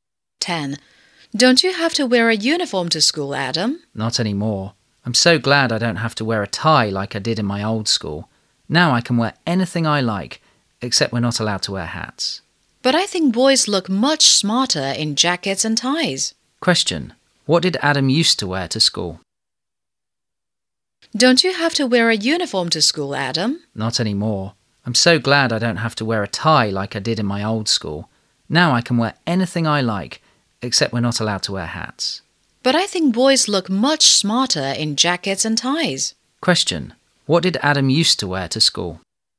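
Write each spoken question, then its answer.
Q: What did Adam used to wear to school?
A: A uniform with a tie.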